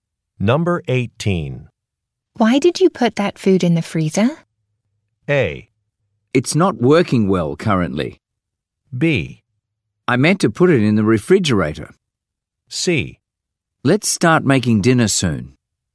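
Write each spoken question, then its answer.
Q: Why did you put that food in the freezer?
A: B: I meant to put it in the refrigerator.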